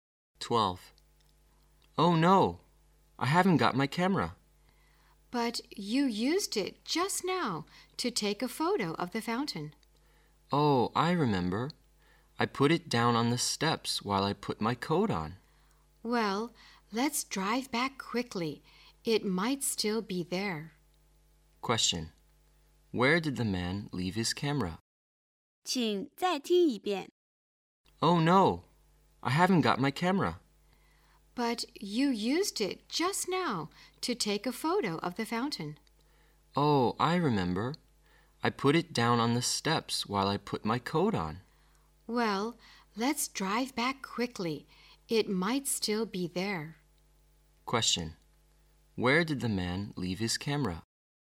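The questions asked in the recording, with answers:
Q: where did the man leave his camera?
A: On the steps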